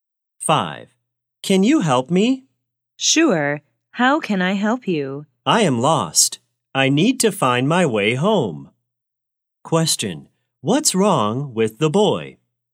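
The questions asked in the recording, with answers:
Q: Question, what's wrong with the boy?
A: He is lost.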